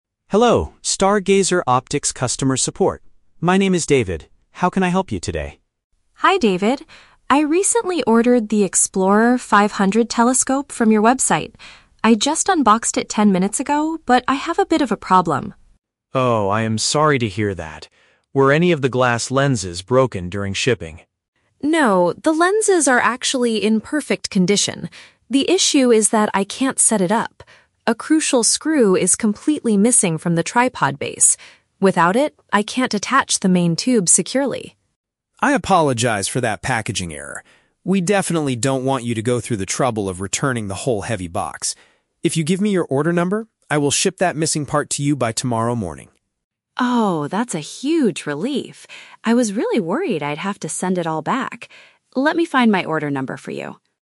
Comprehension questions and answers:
Listen to a phone conversation between a customer and a support agent. Choose the correct answer (A, B, or C) for each question.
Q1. What is the main reason the customer is calling?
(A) To complain about a badly damaged glass lens.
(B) To report an incomplete delivery of a new product.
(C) To ask for instructions on how to use the telescope.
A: (B) To report an incomplete delivery of a new product.

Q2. What exactly is preventing the customer from using the equipment?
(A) An essential metal fastener for the stand is not in the box.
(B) The main viewing tube is too heavy for her to lift alone.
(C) She accidentally dropped and broke a piece during unboxing.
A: (A) An essential metal fastener for the stand is not in the box.

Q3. How will the customer service agent solve the problem?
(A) By sending a completely new telescope to her house.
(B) By asking the customer to return the heavy box for a refund.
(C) By mailing the required small component immediately.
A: (C) By mailing the required small component immediately.

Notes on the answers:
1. The customer says she just "unboxed" the telescope and a "crucial screw is completely missing." Option (B) uses paraphrasing ("incomplete delivery" = missing a part, "new product" = just unboxed). Option (A) is a trap; the agent asks if the glass lenses are broken, but the customer says they are in "perfect condition." Option (C) is a plausible reason to call, but it is not her problem.
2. The customer states that a "crucial screw is completely missing from the tripod base." Option (A) perfectly paraphrases this ("essential metal fastener" = crucial screw, "stand" = tripod base, "not in the box" = missing). Option (B) is a trap; the "heavy box" and "main tube" are mentioned, but weight is not the reason she can't use it. Option (C) is a trap; she didn't break anything.
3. The agent promises to "ship that missing part to you by tomorrow morning." Option (C) uses synonyms ("mailing" = ship, "required small component" = missing part, "immediately" = by tomorrow morning). Option (A) is a trap; the agent explicitly says they don't want her to return the whole box (meaning they won't send a whole new one, just the part). Option (B) is a trap; returning the box is exactly what the agent wants to avoid.

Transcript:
Customer Service: Hello, Stargazer Optics customer support. My name is David. How can I help you today?
Customer: Hi David. I recently ordered the Explorer 500 telescope from your website. I just unboxed it ten minutes ago, but I have a bit of a problem.
Customer Service: Oh, I am sorry to hear that. Were any of the glass lenses broken during shipping?
Customer: No, the lenses are actually in perfect condition. The issue is that I can't set it up. A crucial screw is completely missing from the tripod base. Without it, I can't attach the main tube securely.
Customer Service: I apologize for that packaging error. We definitely don't want you to go through the trouble of returning the whole heavy box. If you give me your order number, I will ship that missing part to you by tomorrow morning.
Customer: Oh, that's a huge relief! I was really worried I'd have to send it all back. Let me find my order number for you.

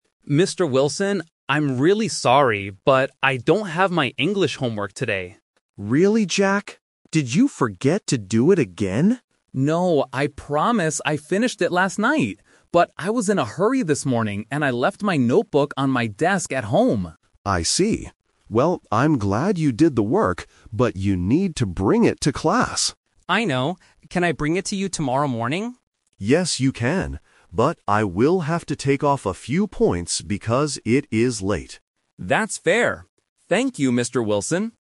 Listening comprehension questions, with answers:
Listen to a student and a teacher talking about homework submission. Select the best option (A, B, or C) for each of the following questions.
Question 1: Why doesn't Jack have his homework today?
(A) He forgot to do it.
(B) He left it at home.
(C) He lost his notebook.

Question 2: Where exactly is Jack's notebook?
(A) On his desk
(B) In his school bag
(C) On his bed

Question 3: When will Jack give his homework to Mr. Wilson?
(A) Today after school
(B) Tomorrow morning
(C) Next week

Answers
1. (B) He left it at home.
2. (A) On his desk
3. (B) Tomorrow morning

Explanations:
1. Jack explicitly says, "...I left my notebook on my desk at home." Why the traps are wrong: Option (A) is "The Twist Trap". Mr. Wilson asks, "Did you forget to do it again?" but Jack says no, he finished it last night. Option (C) is a plausible reason for not having homework, but he didn't lose it; he knows exactly where it is.
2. Jack states the exact location: "...I left my notebook on my desk at home." Why the traps are wrong: Option (B) is "The Rejected Idea" (if it were in his bag, he would have it with him). Option (C) is a "Plausible Trap" for a place in a bedroom, but it is never mentioned.
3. Jack asks, "Can I bring it to you tomorrow morning?" and Mr. Wilson replies, "Yes, you can." Why the traps are wrong: Option (A) is a "Plausible Trap" because students often submit late work after school, but Jack will bring it the next day. Option (C) is also a plausible time but is never mentioned in the audio.

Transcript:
Jack: Mr. Wilson, I'm really sorry, but I don't have my English homework today.
Mr. Wilson: Really, Jack? Did you forget to do it again?
Jack: No, I promise I finished it last night! But I was in a hurry this morning, and I left my notebook on my desk at home.
Mr. Wilson: I see. Well, I'm glad you did the work, but you need to bring it to class.
Jack: I know. Can I bring it to you tomorrow morning?
Mr. Wilson: Yes, you can. But I will have to take off a few points because it is late.

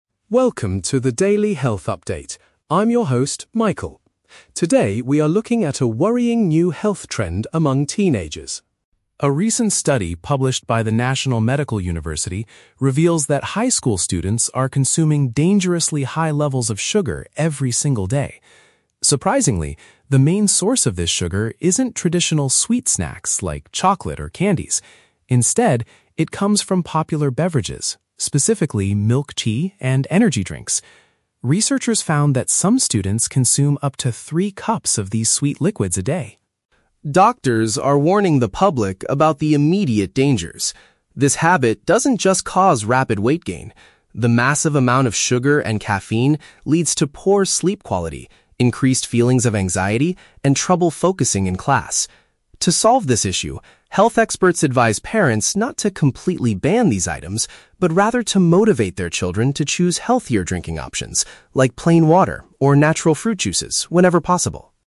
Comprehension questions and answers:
Listen to a short health news report. For each question, choose the correct answer (A, B, or C).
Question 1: According to the new study, where is most of the teenagers' daily sugar coming from?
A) Traditional sugary snacks like chocolate and hard candies.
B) Certain types of popular, heavily sweetened liquids.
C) Unhealthy processed meals served at high school cafeterias.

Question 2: What is one negative effect these products have on students, aside from weight gain?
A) They cause students to have difficulty paying attention during lessons.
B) They make teenagers feel extremely aggressive toward their teachers.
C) They completely destroy the students' appetite for regular, healthy food.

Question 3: What do medical professionals recommend parents do about this situation?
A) Strictly forbid their children from buying anything at the store.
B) Start serving their teenagers fresh fruit after school every day.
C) Encourage their kids to select better, natural drink alternatives.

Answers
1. B) Certain types of popular, heavily sweetened liquids.
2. A) They cause students to have difficulty paying attention during lessons.
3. C) Encourage their kids to select better, natural drink alternatives.

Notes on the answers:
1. The anchor states the main source comes from "popular beverages, specifically milk tea and energy drinks" (heavily sweetened liquids). Option (A) is a trap; the speaker explicitly says the source isn't traditional sweet snacks like chocolate. Option (C) is a trap; "high school" is mentioned, but cafeteria meals are not discussed.
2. The anchor explains that the sugar and caffeine lead to "trouble focusing in class" (difficulty paying attention during lessons). Option (B) is a trap; the speaker mentions "anxiety," but not aggressive behavior. Option (C) is a plausible real-world consequence, but it is not mentioned in this news report.
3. Experts advise parents to "motivate their children to choose healthier drinking options, like plain water or natural fruit juices" (select better, natural drink alternatives). Option (A) is a trap; the speaker explicitly says "not to completely ban these items." Option (B) is a trap; "natural fruit juices" are recommended as a drink, not serving whole fresh fruit to eat.

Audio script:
News Anchor: Welcome to the Daily Health Update. I'm your host, Michael. Today, we are looking at a worrying new health trend among teenagers.
A recent study published by the National Medical University reveals that high school students are consuming dangerously high levels of sugar every single day. Surprisingly, the main source of this sugar isn't traditional sweet snacks like chocolate or candies. Instead, it comes from popular beverages, specifically milk tea and energy drinks. Researchers found that some students consume up to three cups of these sweet liquids a day!
Doctors are warning the public about the immediate dangers. This habit doesn't just cause rapid weight gain. The massive amount of sugar and caffeine leads to poor sleep quality, increased feelings of anxiety, and trouble focusing in class. To solve this issue, health experts advise parents not to completely ban these items, but rather to motivate their children to choose healthier drinking options, like plain water or natural fruit juices, whenever possible.

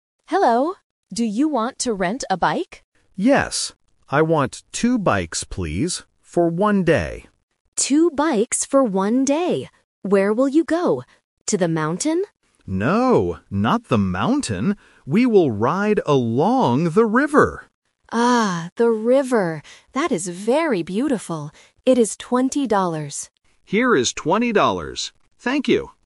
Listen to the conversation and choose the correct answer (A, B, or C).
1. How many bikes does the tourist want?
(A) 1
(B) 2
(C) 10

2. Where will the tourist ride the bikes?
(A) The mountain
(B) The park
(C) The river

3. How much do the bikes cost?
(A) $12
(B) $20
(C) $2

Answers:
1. (B) 2
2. (C) The river
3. (B) $20

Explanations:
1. The tourist clearly says, "I want two bikes, please," and the shop owner repeats, "Two bikes". Option (A) is incorrect. Option (C) is not mentioned.
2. The tourist says, "We will ride along the river." Option (A) "The mountain" is a trap because the shop owner asks about it ("To the mountain?"), but the tourist says "No, not the mountain." Option (B) is not mentioned.
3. The shop owner explicitly states, "It is twenty dollars." Option (A) $12 is a common A1 sound trap (twelve vs. twenty). Option (C) $2 is a distractor using the number of bikes.

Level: A1

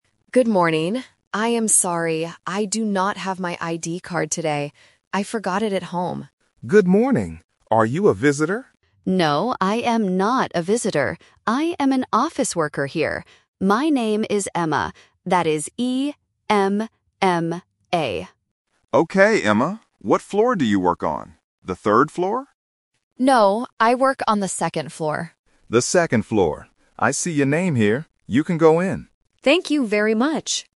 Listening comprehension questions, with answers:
Listen to the conversation between a woman and a security guard. Choose the correct answer (A, B, or C) for each question.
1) Who is the woman?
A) A visitor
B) A security guard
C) An office worker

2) How do you spell the woman's name?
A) E-M-M-A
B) A-M-M-A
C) E-M-A-A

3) Where does the woman work?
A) On the first floor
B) On the second floor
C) On the third floor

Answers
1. C) An office worker
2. A) E-M-M-A
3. B) On the second floor

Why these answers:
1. Emma clearly states: "I am an office worker here." Option (A) is a trap because the security guard asks "Are you a visitor?", but she says "No". Option (B) is the man's job, not the woman's.
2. Emma spells her name very clearly: "E-M-M-A". Options (B) and (C) are distractors with incorrect starting letters or mixed-up letters.
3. Emma says: "I work on the second floor." Option (C) is the trap because the security guard guesses she works on the third floor, but she corrects him. Option (A) is not mentioned in the audio.

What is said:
Emma: Good morning. I am sorry, I do not have my ID card today. I forgot it at home.
Security Guard: Good morning. Are you a visitor?
Emma: No, I am not a visitor. I am an office worker here. My name is Emma.
Security Guard: Okay, Emma. What floor do you work on? The third floor?
Emma: No, I work on the second floor.

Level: A1

